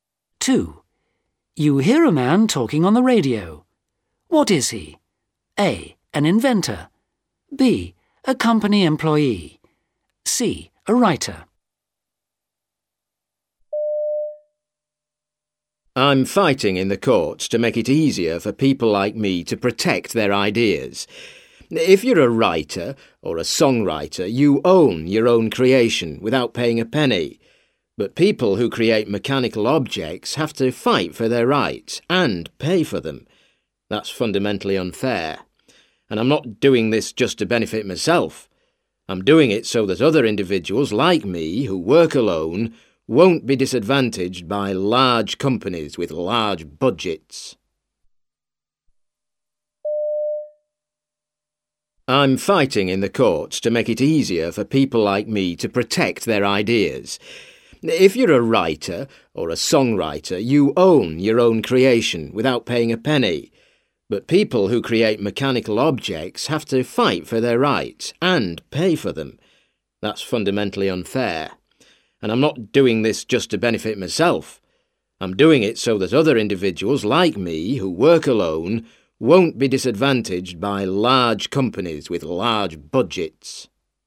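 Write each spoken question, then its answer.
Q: What is he?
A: A: An inventor.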